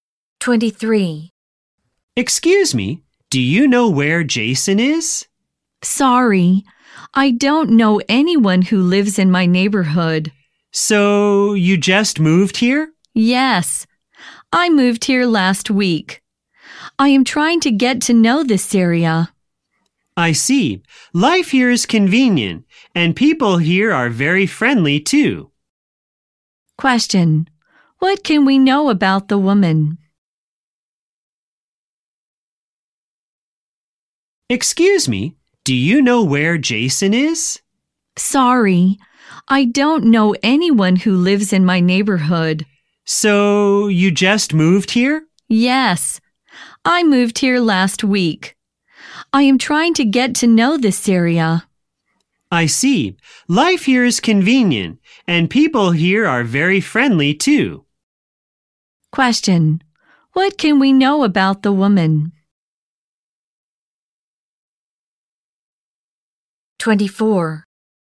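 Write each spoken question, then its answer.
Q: Question: What can we know about the woman?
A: She just moved to the neighborhood last week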